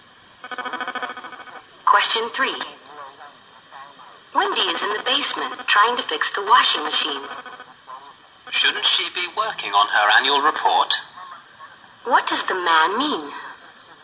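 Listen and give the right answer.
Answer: Wendy should be working on her annual report instead.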